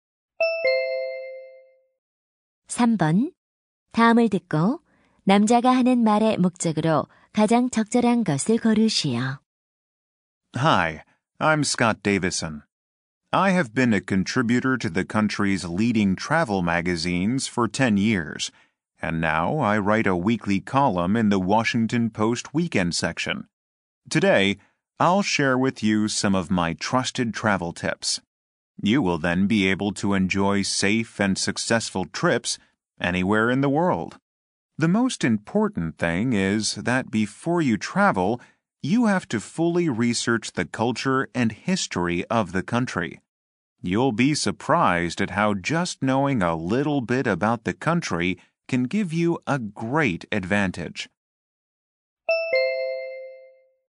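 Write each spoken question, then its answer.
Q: 다음을 듣고 남자가 하는 말의 목적으로 가장 적절한 것을 고르시오.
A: 여행 팁(안전하고 성공적인 여행을 위한 조언)을 알려 주려고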